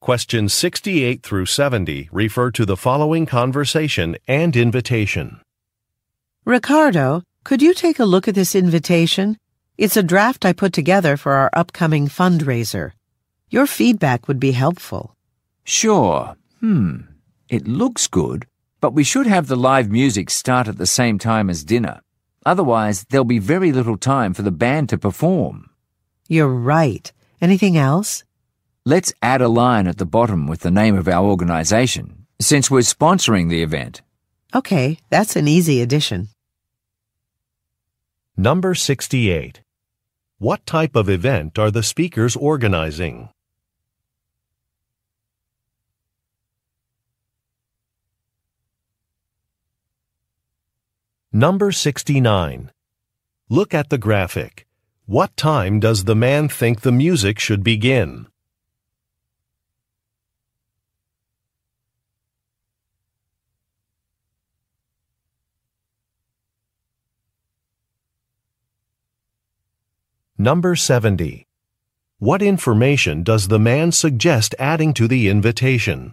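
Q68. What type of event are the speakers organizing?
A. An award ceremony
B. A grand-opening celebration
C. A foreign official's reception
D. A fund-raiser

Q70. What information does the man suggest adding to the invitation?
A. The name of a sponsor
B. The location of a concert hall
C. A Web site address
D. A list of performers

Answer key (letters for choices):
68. D
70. A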